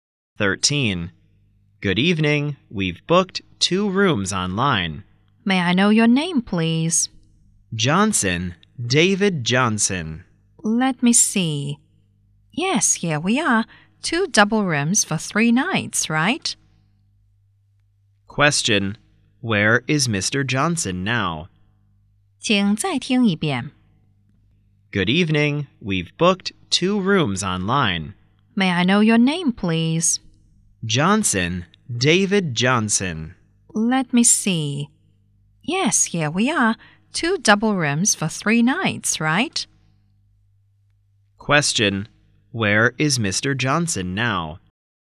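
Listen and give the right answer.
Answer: At a hotel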